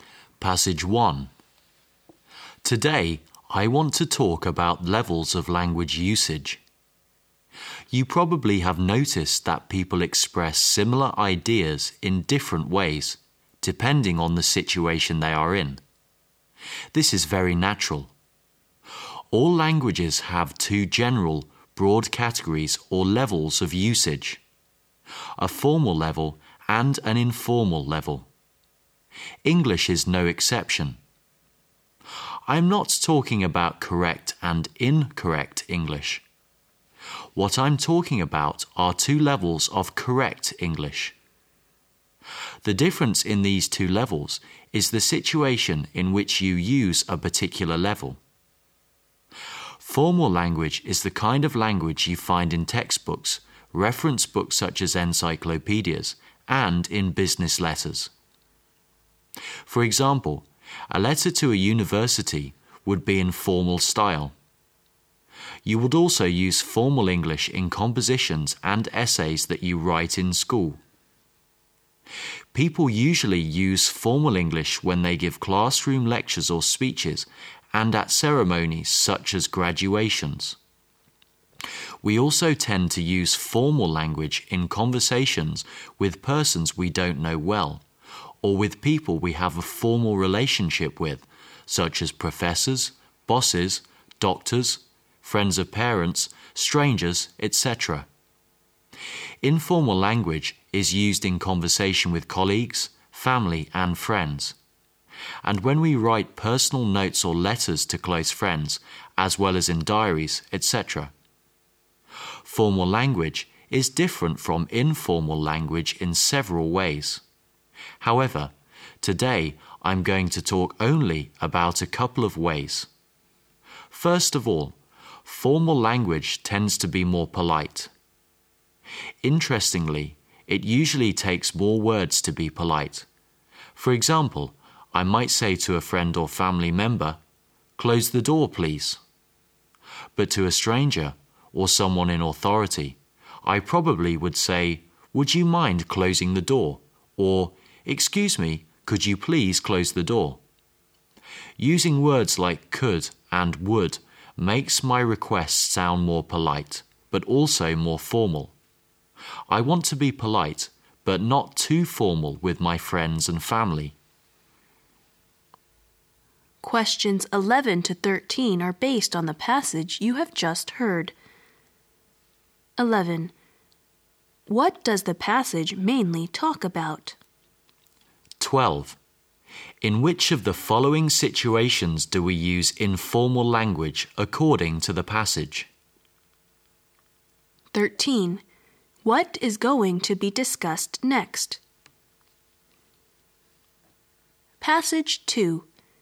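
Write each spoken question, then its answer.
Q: What does the passage mainly talk about?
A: Levels of language usage: formal and informal English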